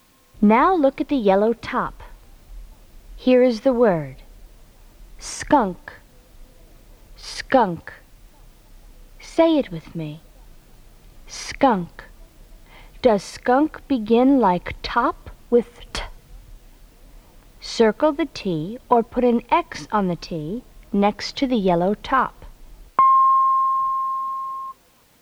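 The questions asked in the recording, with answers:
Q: Does skunk begin like top, with T?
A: No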